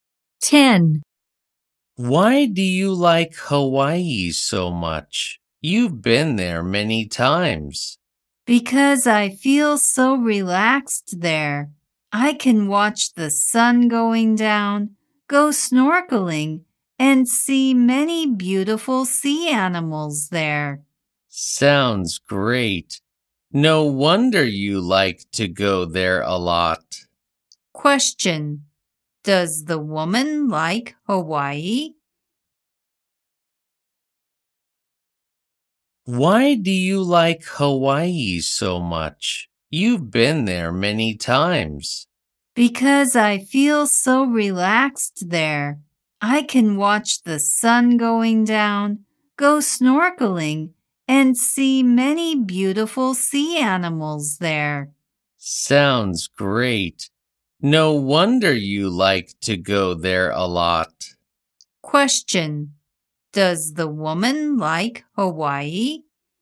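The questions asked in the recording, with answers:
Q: Question. Does the woman like Hawaii?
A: Yes, she does.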